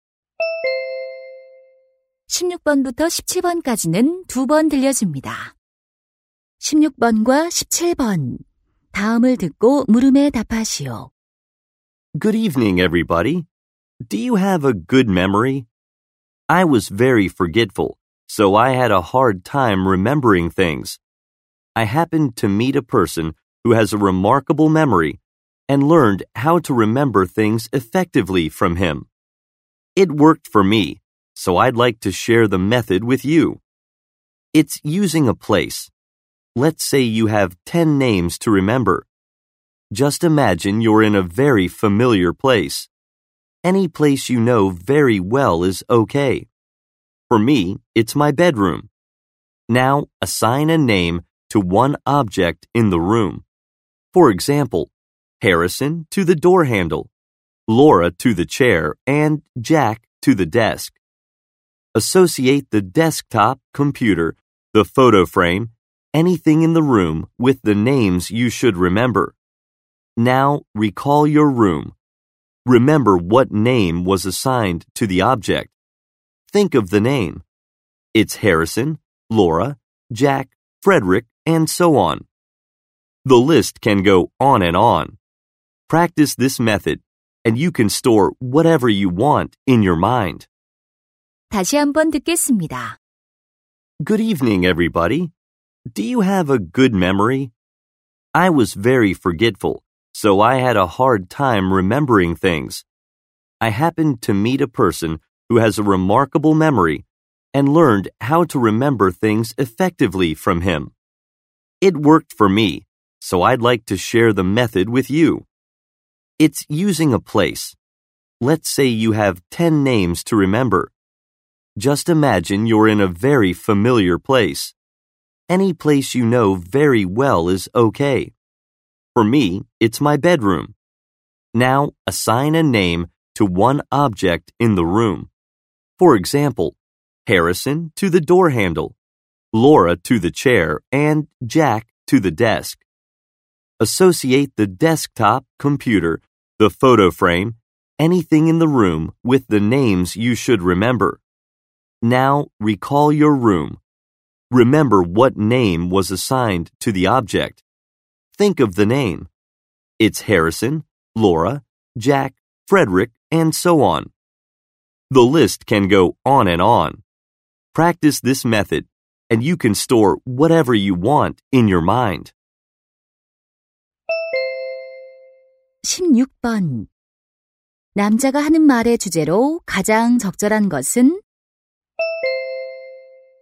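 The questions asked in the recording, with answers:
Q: 남자가 하는 말의 주제로 가장 적절한 것은?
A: 장소를 이용한 효과적인 기억법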